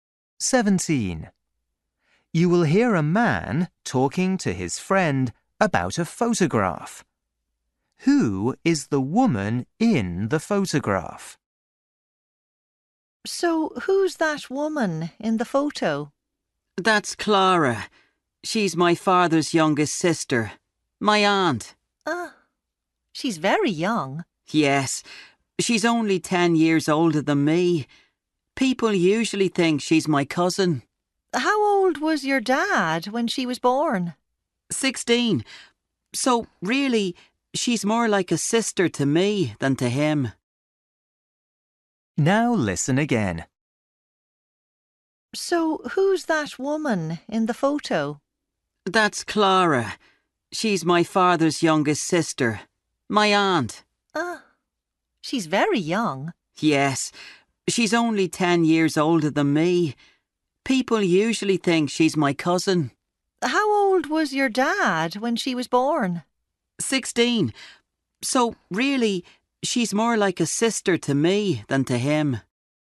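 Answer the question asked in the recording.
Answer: His aunt, his father's youngest sister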